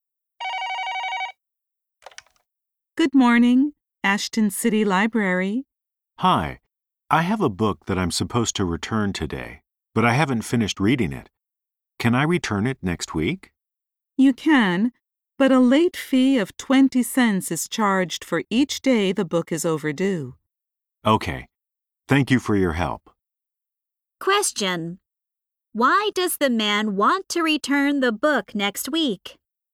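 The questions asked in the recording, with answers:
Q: Why does the man want to return the book next week?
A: He hasn't finished reading it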